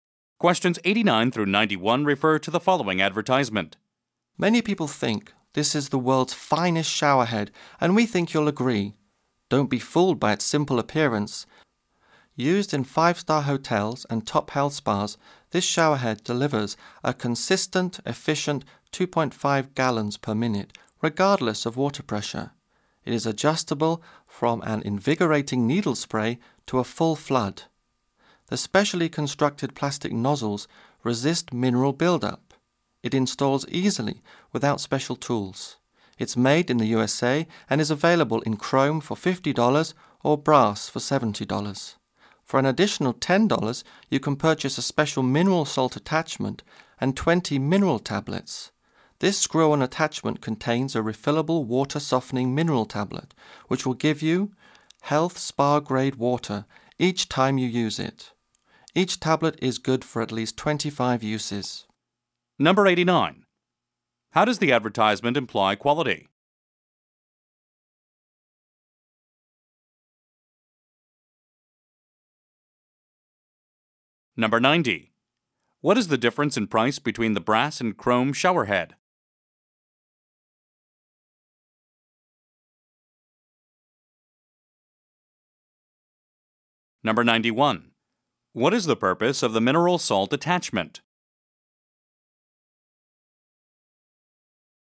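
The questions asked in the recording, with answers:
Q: What is the difference in price between the brass and chrome showerhead?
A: $20

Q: What is the purpose of the mineral salt attachment?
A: To soften the water and give health spa-grade water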